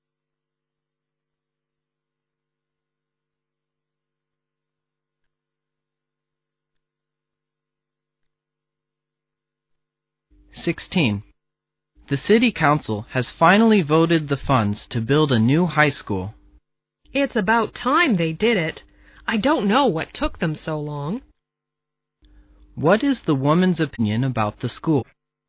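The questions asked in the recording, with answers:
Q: What is the woman's opinion about the school?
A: It should have been built long ago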